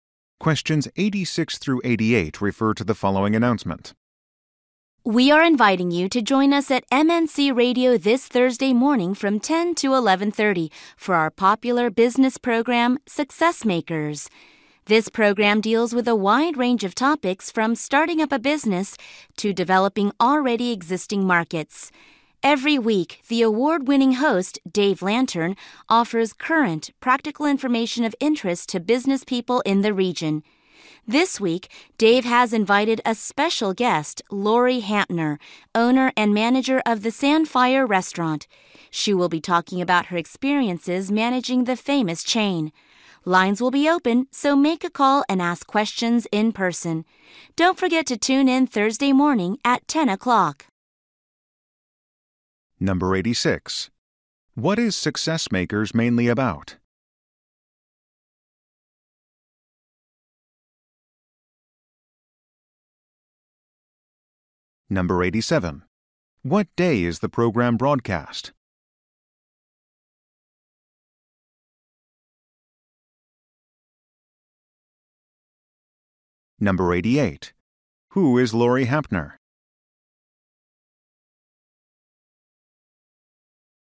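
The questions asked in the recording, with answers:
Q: What is Success Makers mainly about?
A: Business

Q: What day is the program broadcast?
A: Thursday

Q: Who is Lori Hantner?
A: Owner and manager of the Sandfire Restaurant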